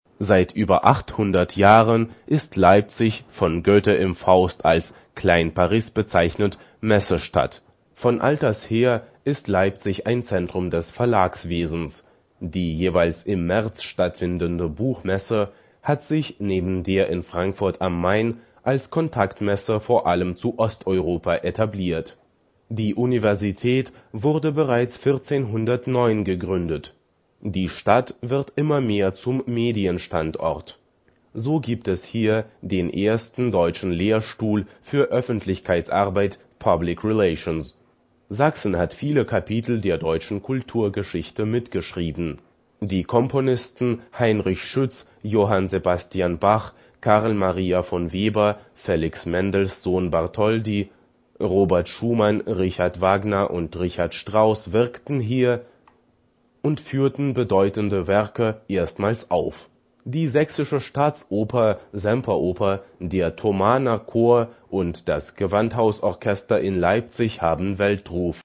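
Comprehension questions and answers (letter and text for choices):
- Seht das Arbeitsblatt No 1, hört zu und wählt dann richtige Antworten. Arbeitet zu zweit!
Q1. Leipzig ist von Goethe im Faust als ...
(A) Elb-Florenz bezeichnet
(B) Klein Paris bezeichnet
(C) Klein Wien bezeichnet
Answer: (B) Klein Paris bezeichnet

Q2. Im März findet hier ... statt.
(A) Buchmesse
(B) Oktoberfest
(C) Rockkonzerte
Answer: (A) Buchmesse

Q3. Die berühmten ... wirkten hier.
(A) Politiker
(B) Komponisten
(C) Erforscher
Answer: (B) Komponisten

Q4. Der Thomanerchor und das Gewandhausorchester ...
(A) Sind weltberühmt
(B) Sind unbekant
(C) Sein weltberühmt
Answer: (A) Sind weltberühmt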